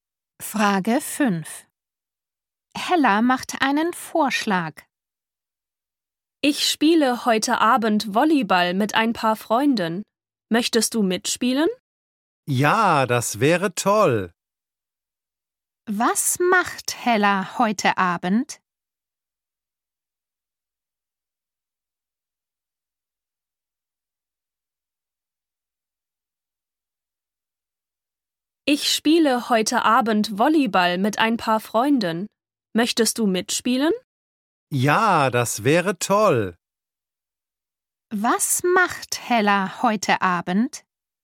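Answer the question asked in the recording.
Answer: Sie spielt Volleyball mit Freunden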